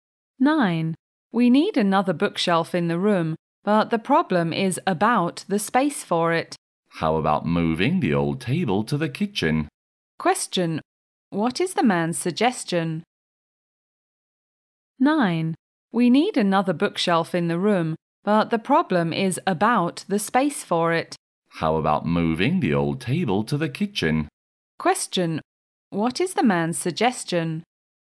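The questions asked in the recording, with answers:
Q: What is the man's suggestion?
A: Moving the old table to the kitchen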